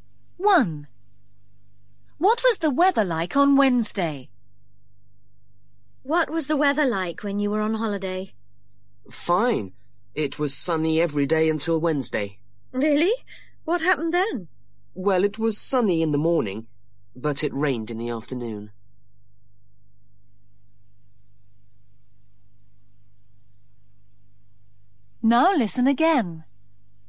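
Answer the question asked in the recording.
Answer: Sunny in the morning, rain in the afternoon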